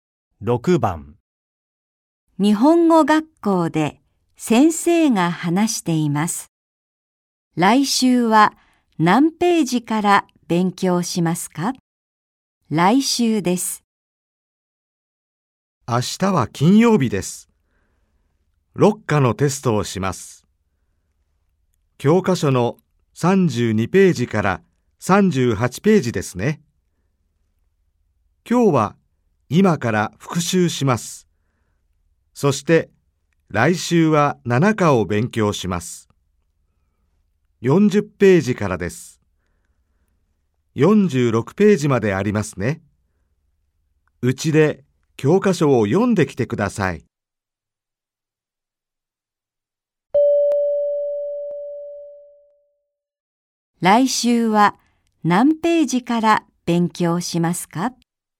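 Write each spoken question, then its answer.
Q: 来週は何ページから勉強しますか?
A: 40ページ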